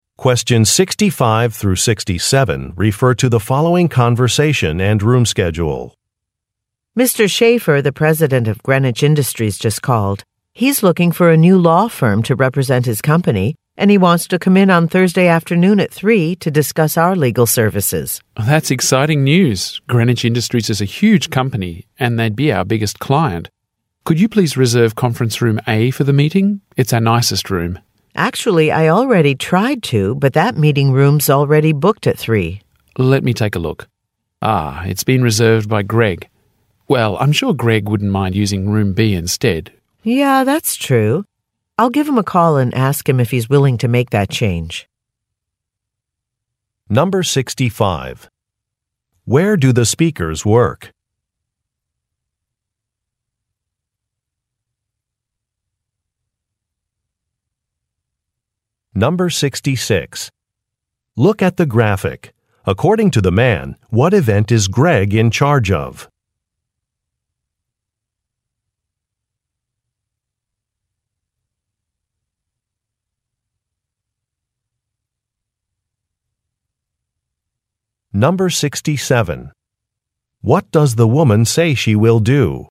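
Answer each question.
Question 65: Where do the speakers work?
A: At a law firm

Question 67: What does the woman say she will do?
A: Ask a coworker to change rooms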